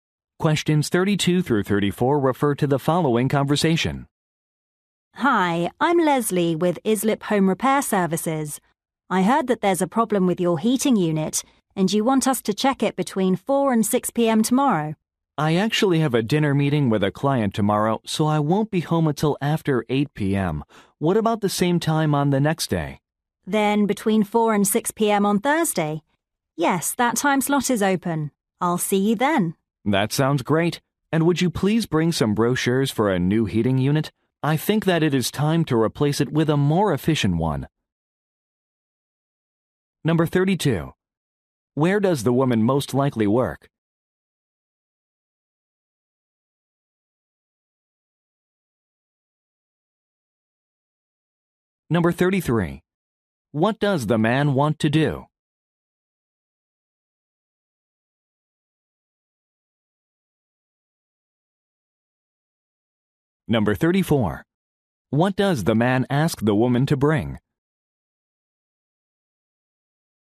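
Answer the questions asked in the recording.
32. At a home repair service company
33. Reschedule the appointment to Thursday
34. Brochures for a new heating unit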